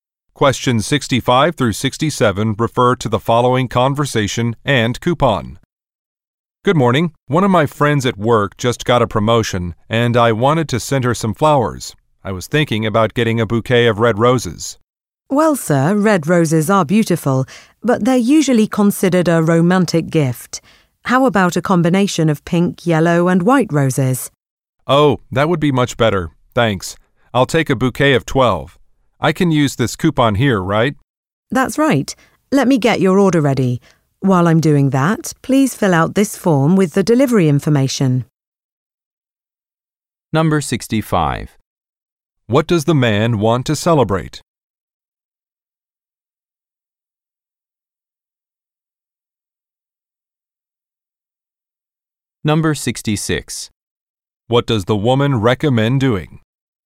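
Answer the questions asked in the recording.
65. A friend's promotion
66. Choosing mixed pink, yellow and white roses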